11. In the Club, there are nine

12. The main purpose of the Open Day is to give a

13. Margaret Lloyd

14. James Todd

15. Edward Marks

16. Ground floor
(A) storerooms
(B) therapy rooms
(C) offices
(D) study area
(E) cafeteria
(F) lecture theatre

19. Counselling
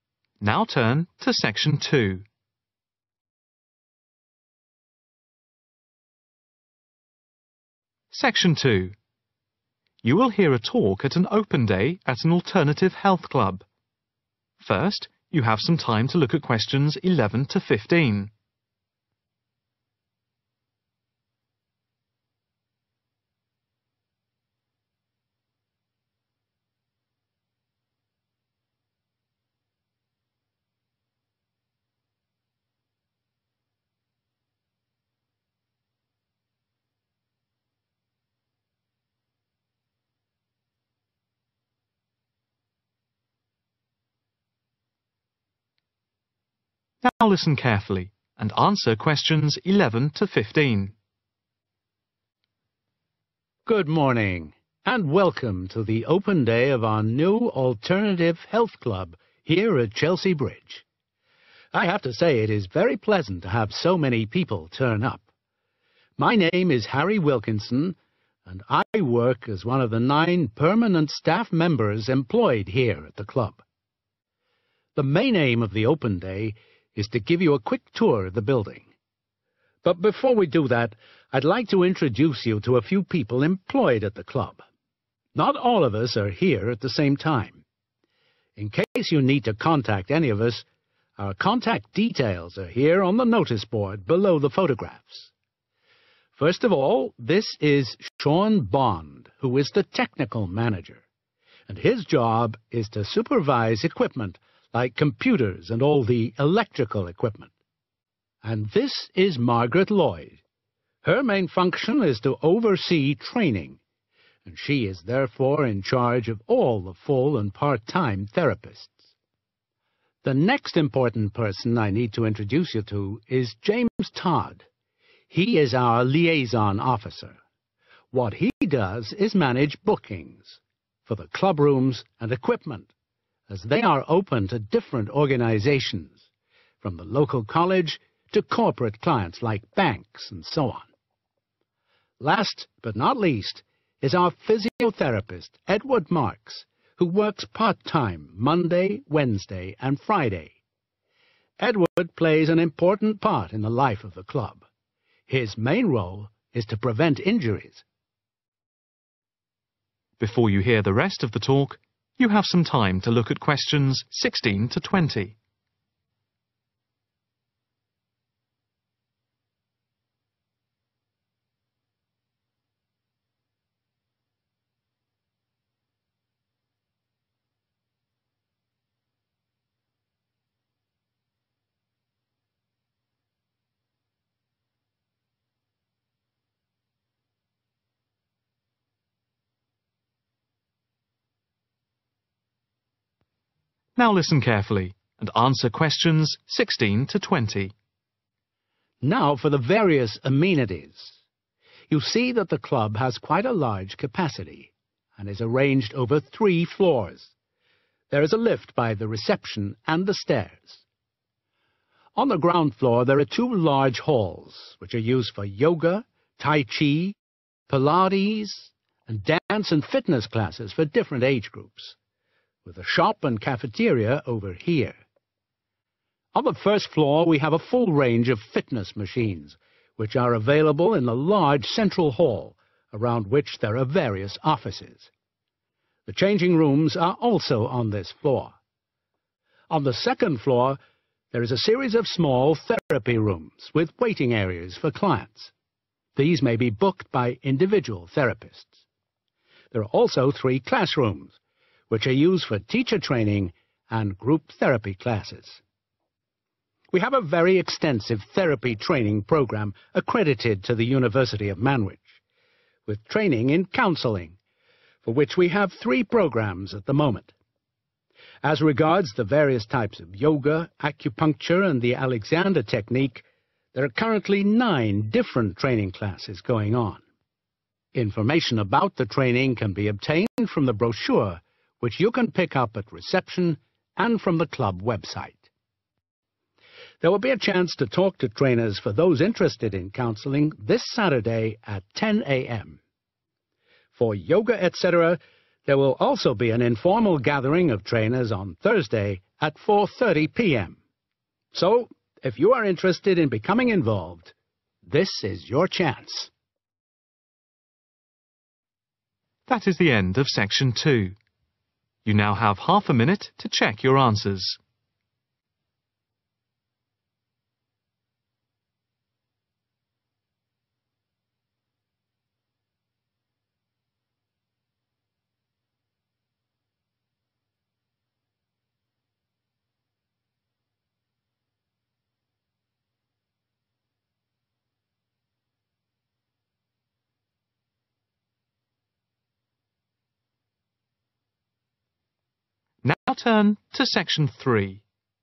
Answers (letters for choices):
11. permanent staff members
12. tour/quick tour
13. oversee training
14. manage bookings
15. prevent injuries
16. E
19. 3/three